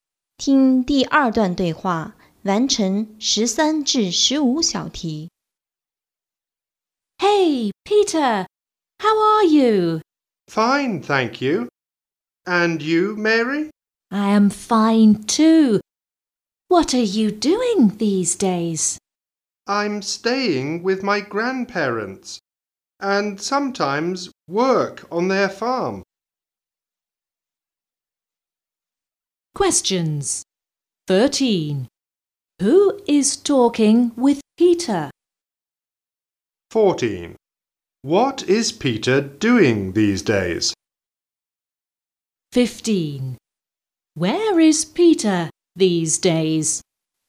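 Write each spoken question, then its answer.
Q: Who is talking with Peter?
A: Mary

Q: What is Peter doing these days?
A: Staying with his grandparents and sometimes working on their farm

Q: Where is Peter these days?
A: At his grandparents' (farm)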